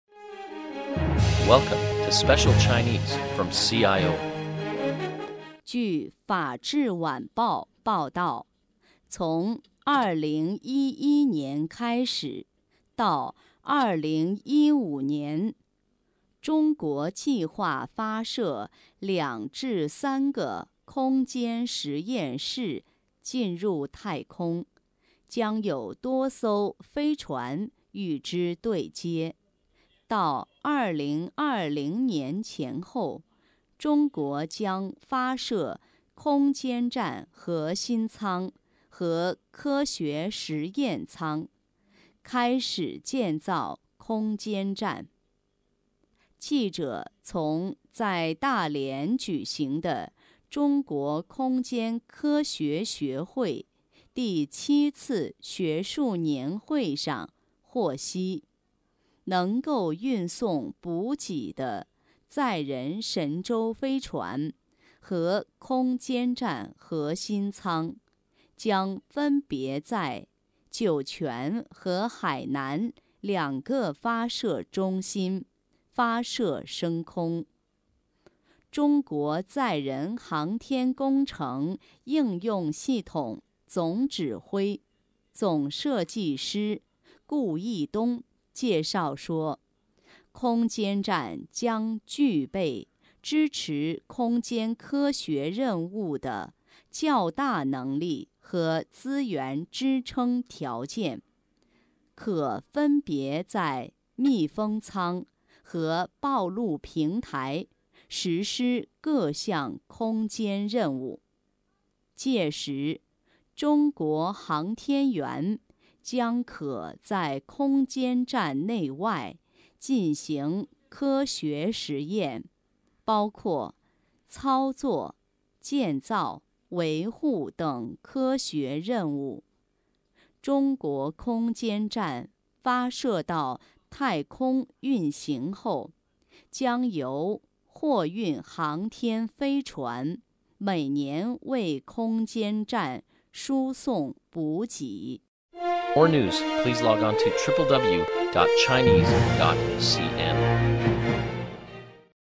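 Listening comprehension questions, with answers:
Please answer the following questions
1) 中国将在什么时候建造空间站?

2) 载人神舟飞船和空间站核心舱,将在哪儿发射升空?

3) 中国航天员将来是否可在空间站的外面工作?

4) 未来中国空间站的补给怎么解决?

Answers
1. 2020年前后
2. 分别在酒泉和海南两个发射中心
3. 可以,航天员将可在空间站内外进行科学实验
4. 由货运航天飞船每年为空间站输送补给

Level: M.Phil Year 2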